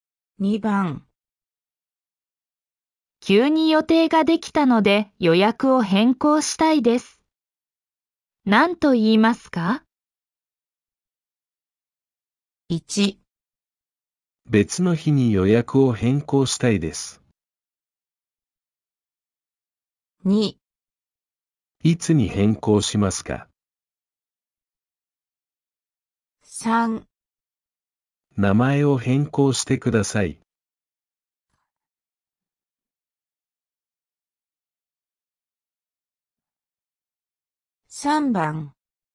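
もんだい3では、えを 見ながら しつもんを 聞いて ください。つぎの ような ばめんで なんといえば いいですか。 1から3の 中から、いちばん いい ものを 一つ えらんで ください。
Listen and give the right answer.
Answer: 1

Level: N4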